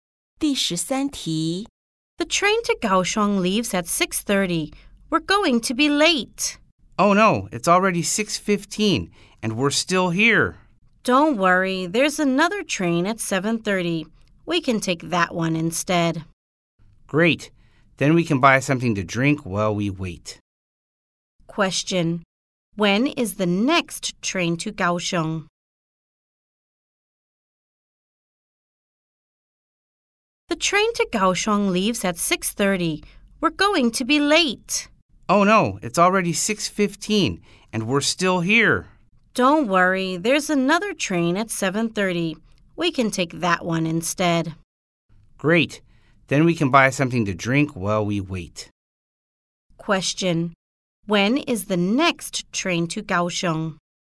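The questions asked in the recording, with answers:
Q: When is the next train to Kaohsiung?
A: At 7:30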